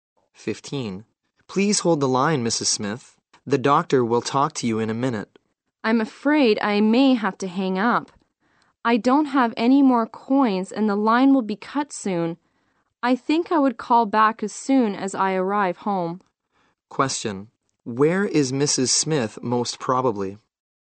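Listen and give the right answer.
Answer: At a public pay phone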